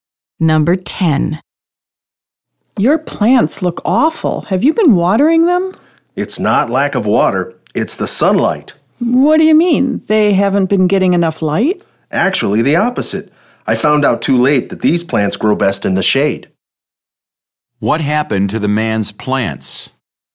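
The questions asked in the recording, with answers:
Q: What happened to the man's plants?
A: They got too much sunlight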